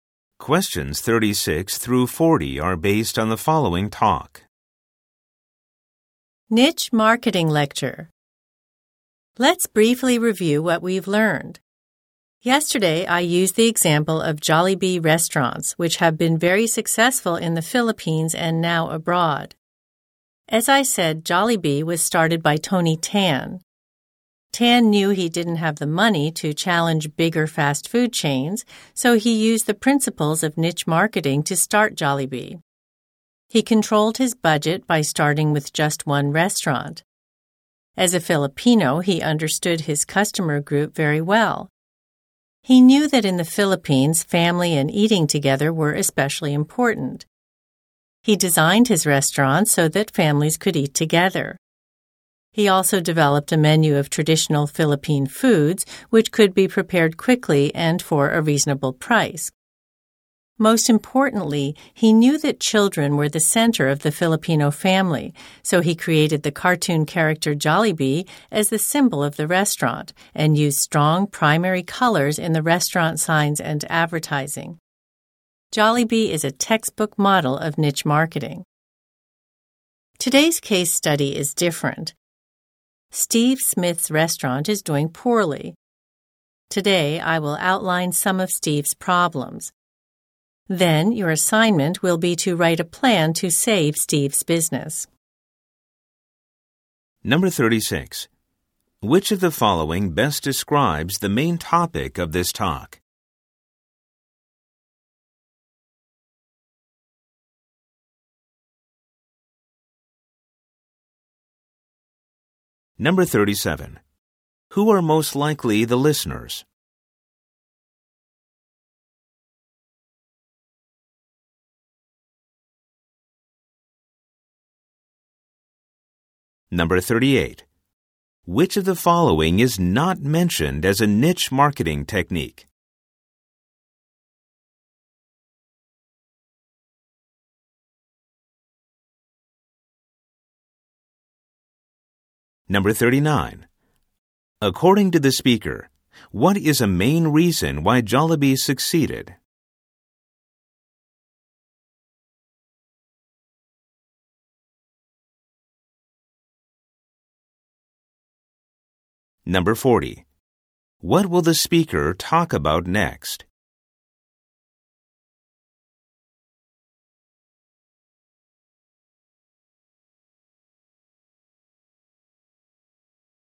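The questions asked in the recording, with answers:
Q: Which of the following best describes the main topic of this talk?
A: Niche marketing, using Jollibee as an example

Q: Who are most likely the listeners?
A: Business or marketing students

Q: What will the speaker talk about next?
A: The problems of Steve Smith's restaurant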